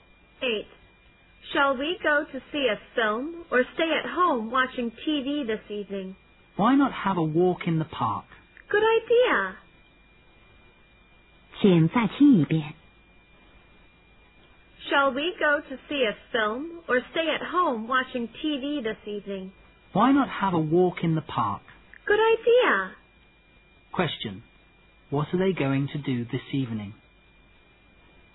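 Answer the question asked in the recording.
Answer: Have a walk in the park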